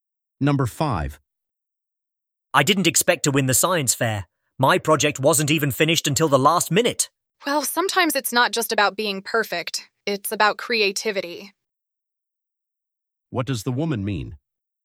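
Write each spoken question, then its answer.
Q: What does the woman mean?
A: Creativity matters more than perfection, so the project could still win.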